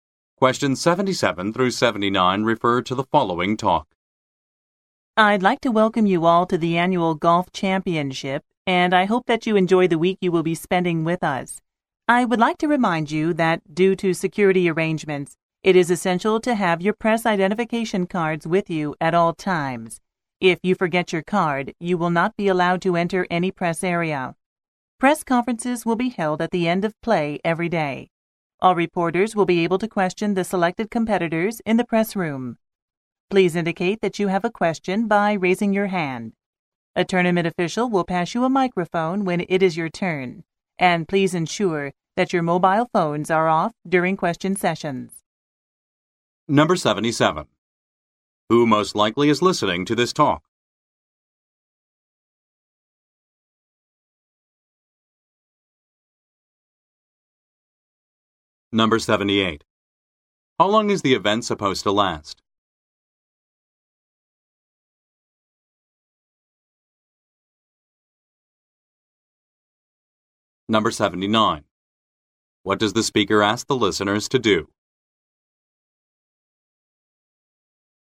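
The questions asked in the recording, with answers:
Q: Who most likely is listening to this talk?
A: Reporters

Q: How long is the event supposed to last?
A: A week

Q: What does the speaker ask the listeners to do?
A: Carry their press identification cards at all times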